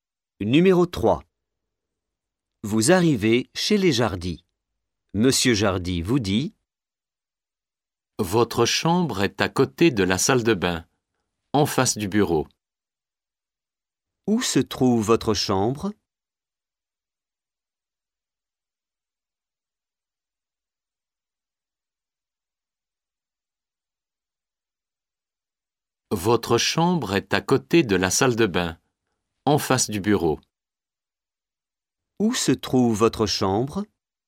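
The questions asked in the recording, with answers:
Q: Où se trouve votre chambre ?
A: À côté de la salle de bain, en face du bureau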